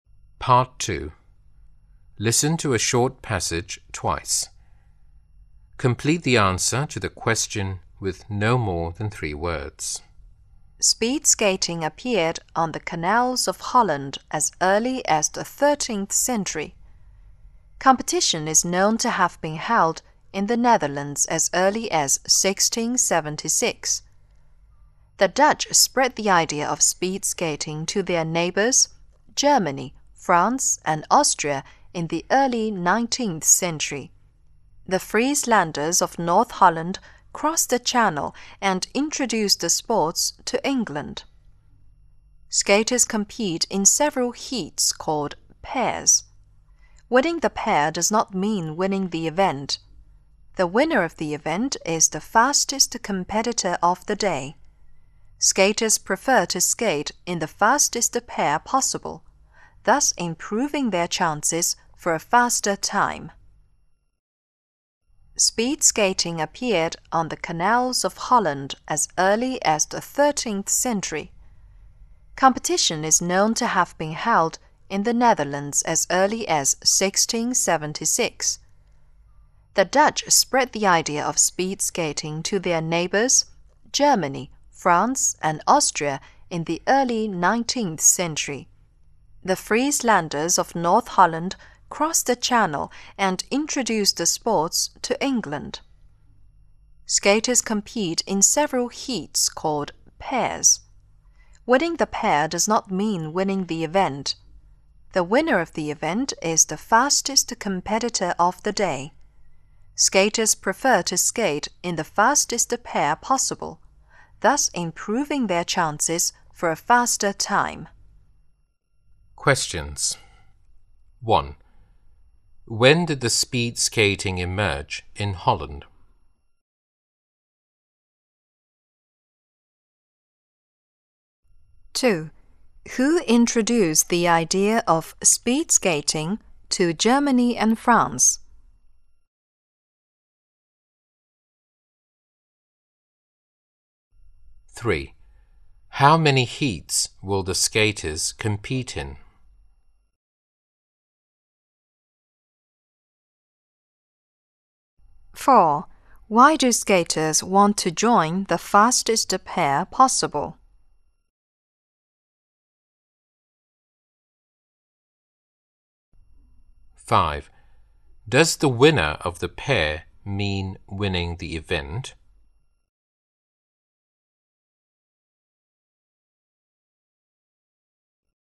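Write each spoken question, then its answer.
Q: When did the speed skating emerge in Holland?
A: In the 13th century

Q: Who introduced the idea of speed skating to Germany and France?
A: The Dutch

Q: How many heats will the skaters compete in?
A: Several heats (pairs)

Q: Why do skaters want to join the fastest pair possible?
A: To improve their chances for a faster time

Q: Does the winner of the pair mean winning the event?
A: No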